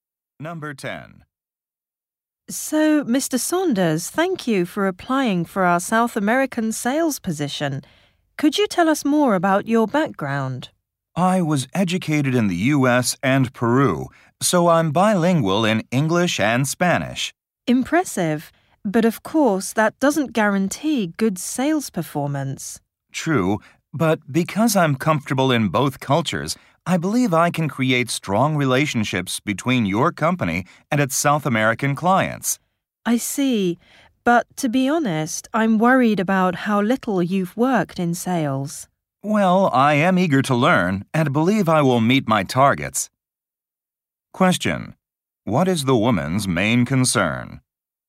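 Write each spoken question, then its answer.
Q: What is the woman's main concern?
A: Mr. Saunders has little sales experience.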